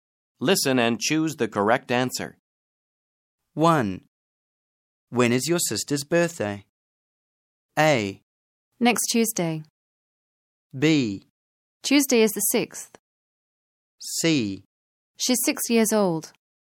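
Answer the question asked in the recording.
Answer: A: Next Tuesday.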